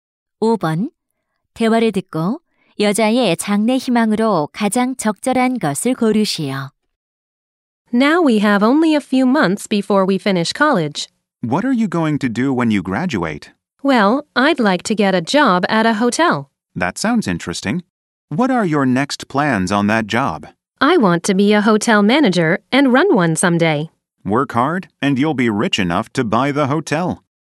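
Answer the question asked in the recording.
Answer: 호텔 지배인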